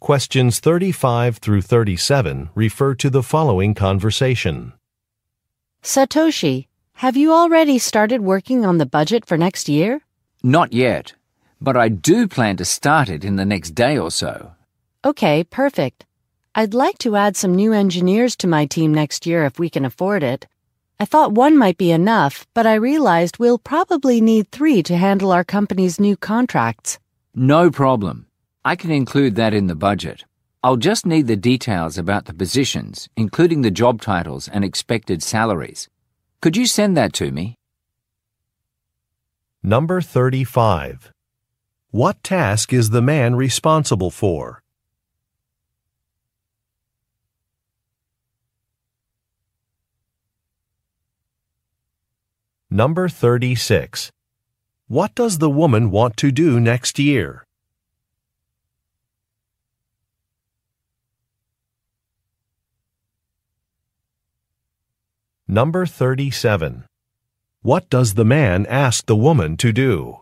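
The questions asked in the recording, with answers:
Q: What task is the man responsible for?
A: Preparing next year's budget

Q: What does the woman want to do next year?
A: Hire new engineers for her team

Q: What does the man ask the woman to do?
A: Send details about the positions, including job titles and expected salaries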